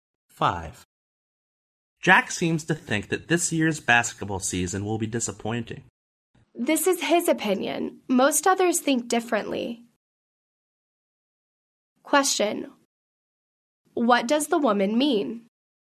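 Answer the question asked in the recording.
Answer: Most people don't agree with Jack; they think the season won't be disappointing.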